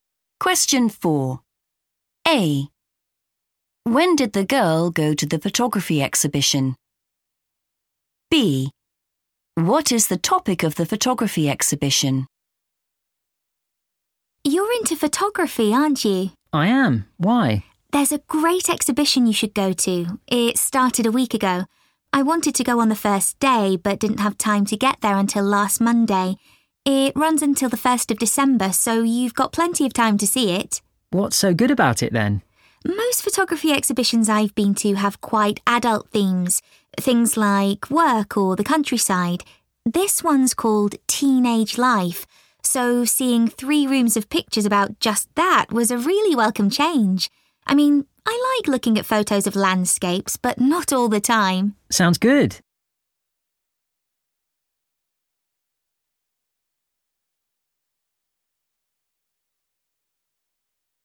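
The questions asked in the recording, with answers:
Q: When did the girl go to the photography exhibition?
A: last Monday

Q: What is the topic of the photography exhibition?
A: Teenage Life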